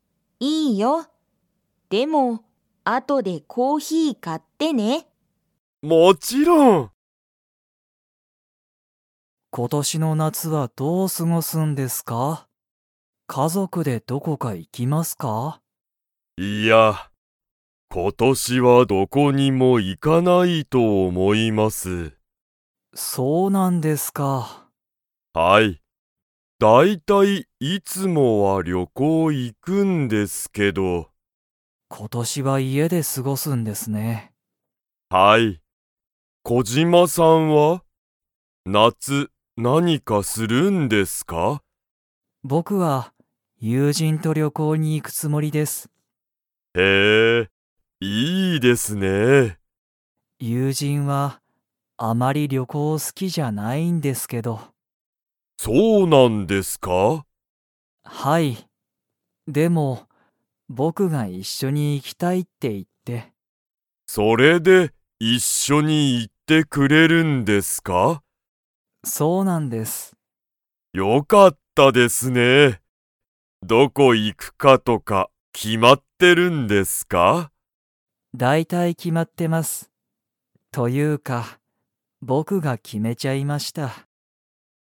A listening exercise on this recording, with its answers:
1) 大西おおにしさんは、今年ことしの夏なつは旅行りょこうに 。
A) 行いく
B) 行いかない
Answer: B) 行いかない

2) 小島こじまさんは、誰だれと旅行りょこうに行いきますか?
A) 会社かいしゃの人ひと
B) 親おや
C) 友人ゆうじん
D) 子供こども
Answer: C) 友人ゆうじん

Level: Level 3

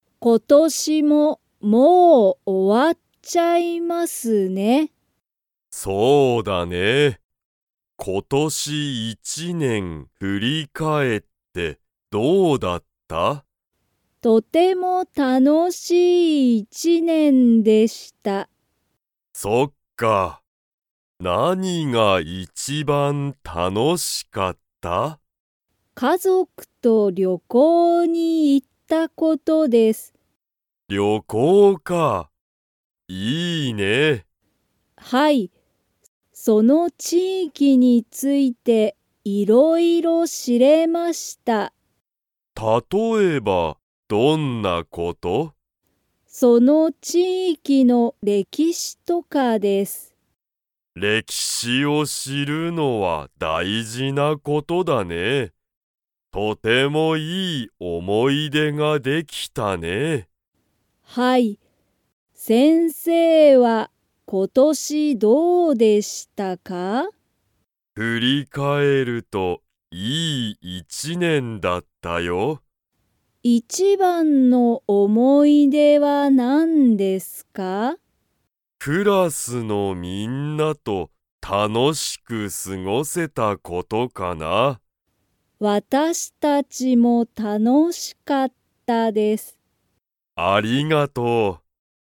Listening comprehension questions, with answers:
Comprehension Quiz (Skip if you don't understand the conversation yet)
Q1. 今年ことし、桜井さくらいさんは何なにが一番いちばん楽たのしかったですか?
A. 勉強べんきょう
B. 料理りょうり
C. 音楽おんがく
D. 旅行りょこう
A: D. 旅行りょこう

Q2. 先生せんせいは今年ことし 一年いちねんだった。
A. いい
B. 悪わるい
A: A. いい

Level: Level 3

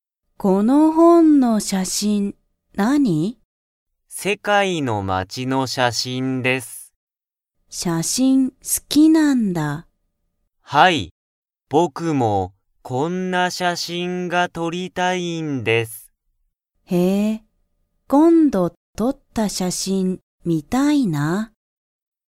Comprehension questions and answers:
Comprehension Quiz (Skip if you don't understand the conversation yet)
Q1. この本(ほん)の写真(しゃしん)は、______)の写真しゃしんだ。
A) 世界(せかい)の街(まち)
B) 日本(にほん)の山(やま)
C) 世界(せかい)の人(ひと)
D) 日本(にほん)のゲーム)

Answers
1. A) 世界(せかい)の街(まち)

